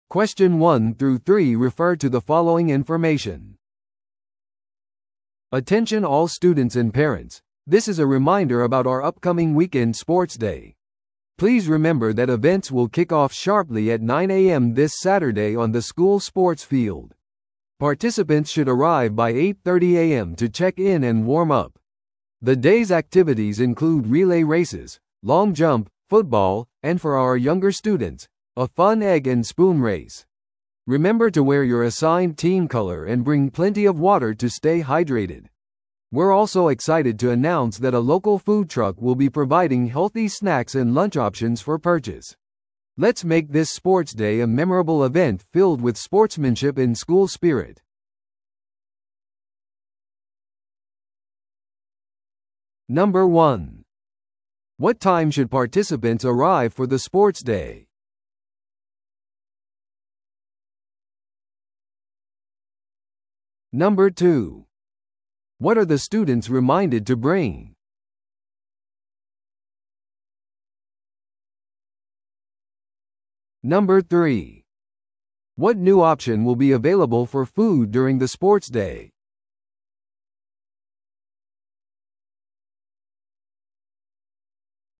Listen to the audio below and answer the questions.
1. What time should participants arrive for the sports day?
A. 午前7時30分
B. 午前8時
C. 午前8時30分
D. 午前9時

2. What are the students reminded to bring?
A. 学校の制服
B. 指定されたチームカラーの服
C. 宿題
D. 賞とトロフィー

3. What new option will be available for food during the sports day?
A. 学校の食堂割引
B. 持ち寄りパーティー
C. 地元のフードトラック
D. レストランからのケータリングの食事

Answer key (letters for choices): 1C, 2B, 3C

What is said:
Attention all students and parents, this is a reminder about our upcoming weekend sports day. Please remember that events will kick off sharply at 9am this Saturday on the school sports field. Participants should arrive by 8:30am to check in and warm up. The day's activities include relay races, long jump, football, and for our younger students, a fun egg-and-spoon race. Remember to wear your assigned team color and bring plenty of water to stay hydrated. We're also excited to announce that a local food truck will be providing healthy snacks and lunch options for purchase. Let's make this sports day a memorable event filled with sportsmanship and school spirit!